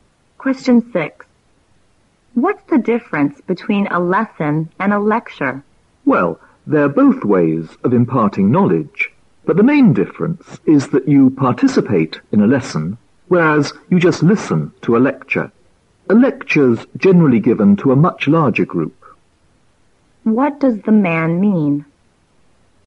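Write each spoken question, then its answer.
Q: What does the man mean?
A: Students take part in a lesson, but they only listen to a lecture, which is usually given to a bigger group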